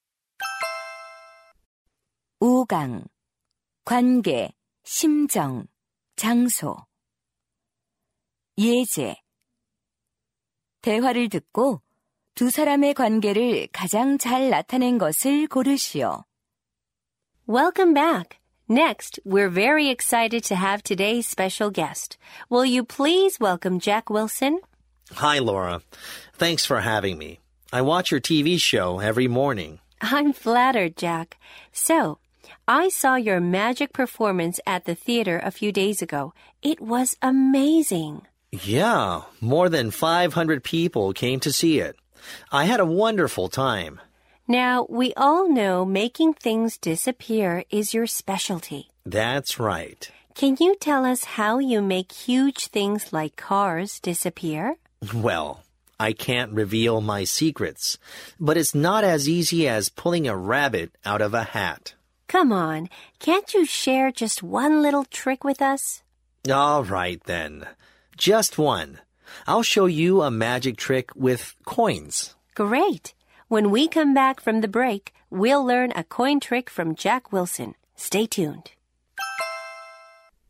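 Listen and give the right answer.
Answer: TV 토크쇼 진행자 - 마술사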